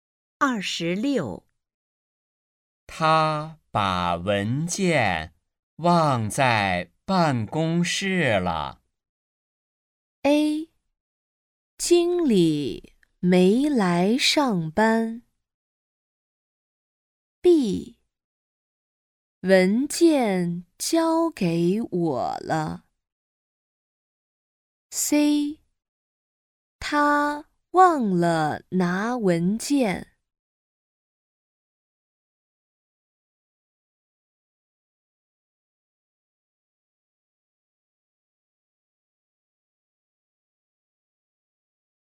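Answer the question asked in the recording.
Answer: C: 他忘了拿文件。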